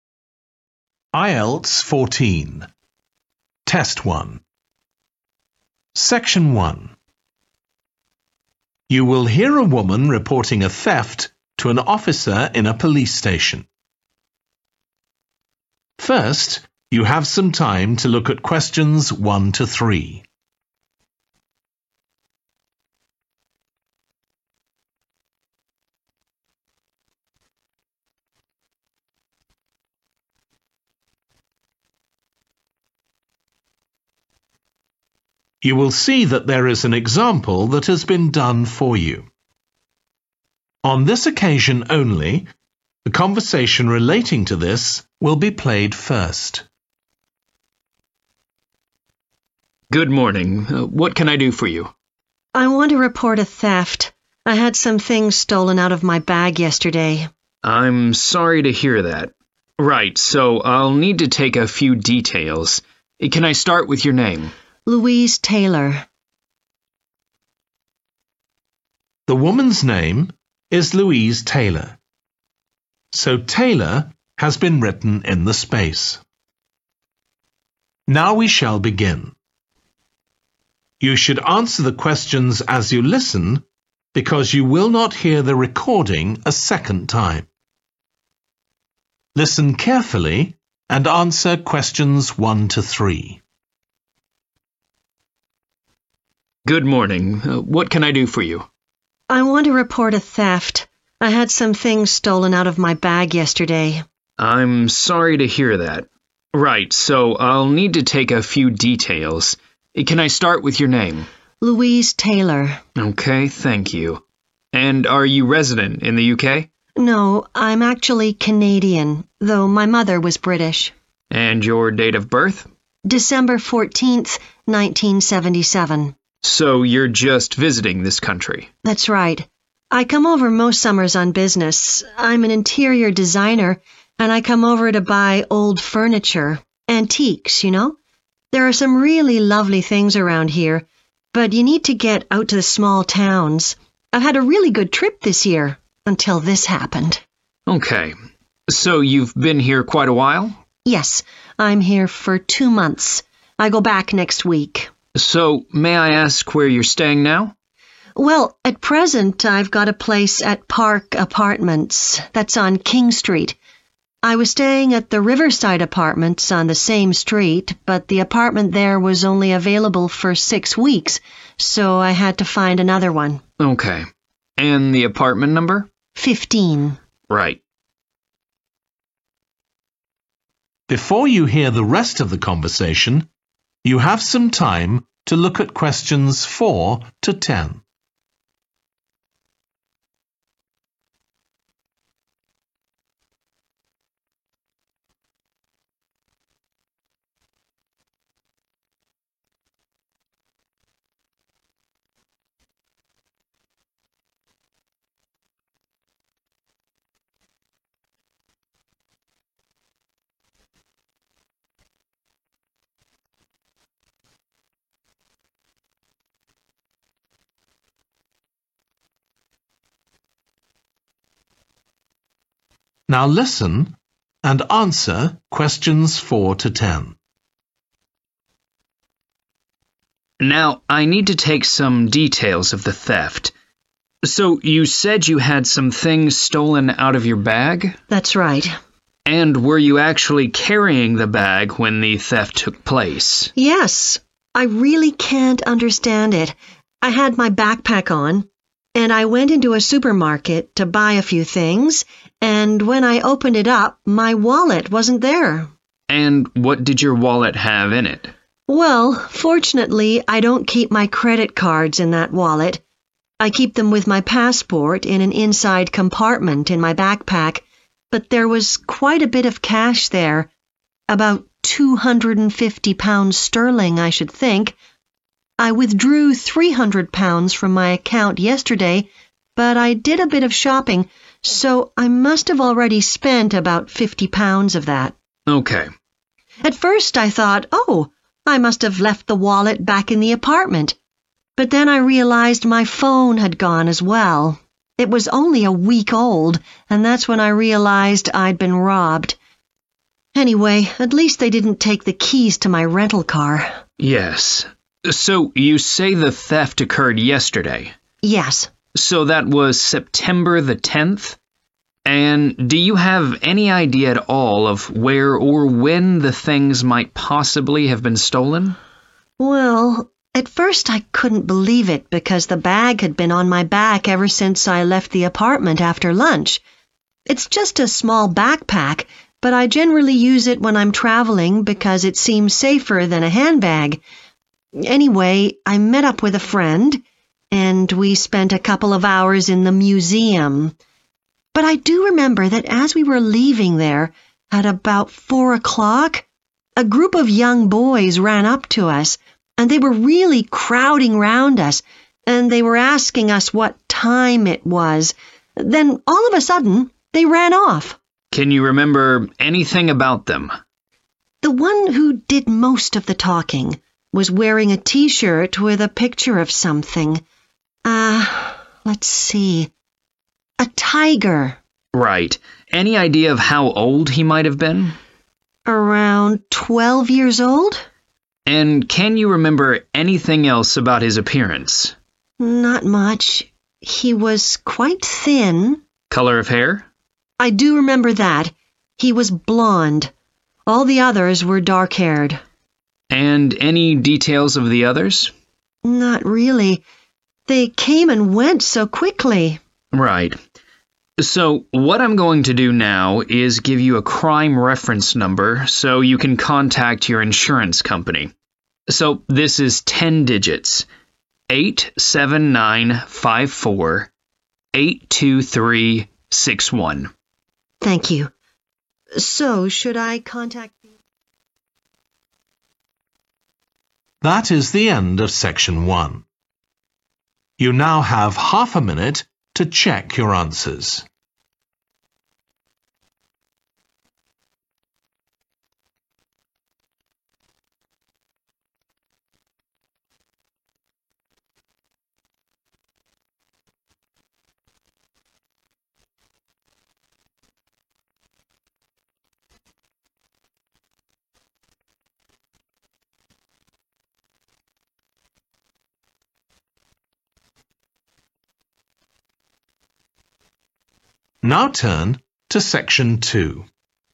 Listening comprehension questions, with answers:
Complete the form below. Write ONE WORD AND/OR A NUMBER for each answer.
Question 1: Nationality: 1.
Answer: Canadian

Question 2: Reason for visit: business (to buy antique 2. )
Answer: furniture

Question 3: Current address: 3. Apartments (No 15)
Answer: Park

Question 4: – a wallet containing approximately 4. £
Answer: 250 (sterling)

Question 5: – a 5.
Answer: phone

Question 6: Date of theft: 6.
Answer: 10(th) September

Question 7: Location: outside the 7. at about 4 pm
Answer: museum

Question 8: – some boys asked for the 8. then ran off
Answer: time

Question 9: he was about 12, slim build with 9. hair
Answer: blond(e)

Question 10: The crime reference number allocated : 10.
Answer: 8795482361